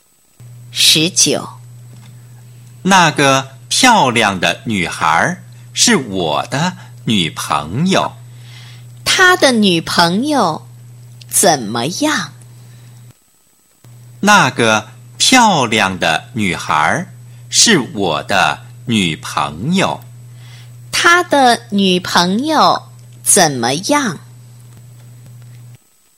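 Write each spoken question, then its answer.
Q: 她的女朋友怎么样?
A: 很漂亮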